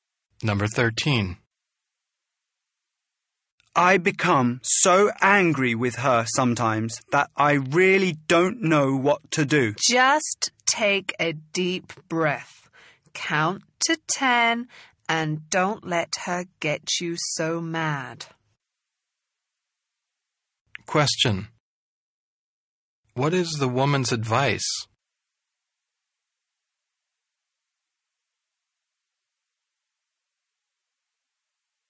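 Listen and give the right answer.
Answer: Take a deep breath and count to 10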